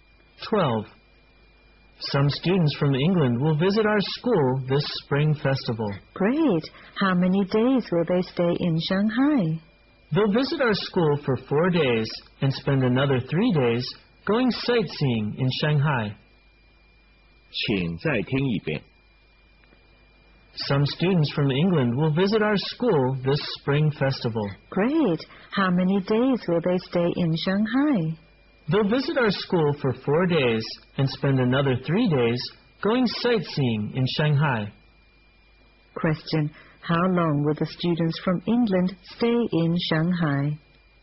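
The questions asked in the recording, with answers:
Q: How long will the students from England stay in Shanghai?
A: 7 days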